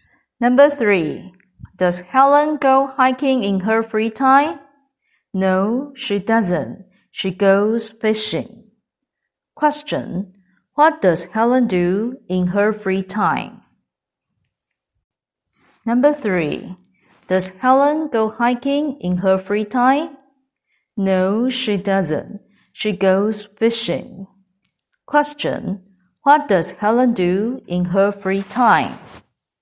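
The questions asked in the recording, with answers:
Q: What does Helen do in her free time?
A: She goes fishing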